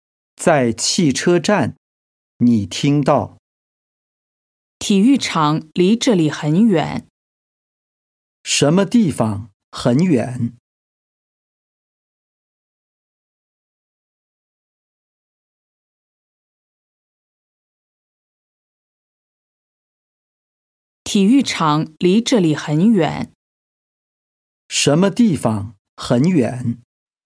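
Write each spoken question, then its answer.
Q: 什么地方很远?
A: 体育场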